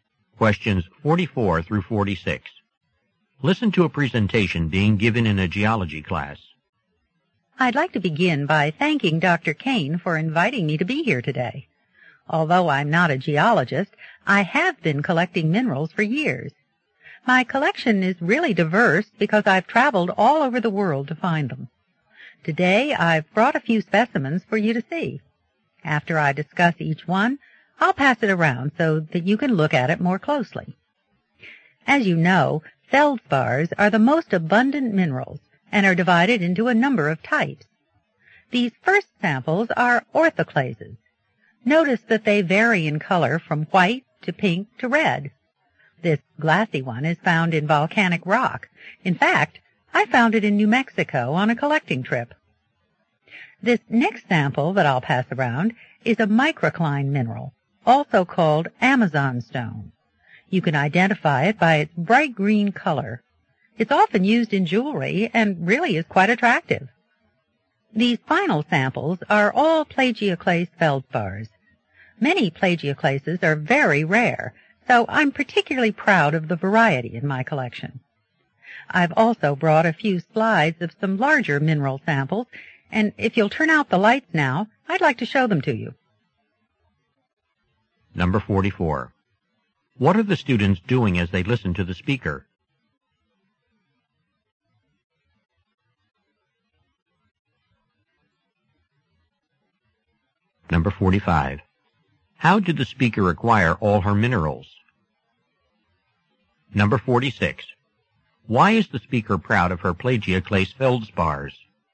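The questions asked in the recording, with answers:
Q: How did the speaker acquire all her minerals?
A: By traveling around the world to collect them

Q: Why is the speaker proud of her plagioclase feldspars?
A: Many are rare and her collection is varied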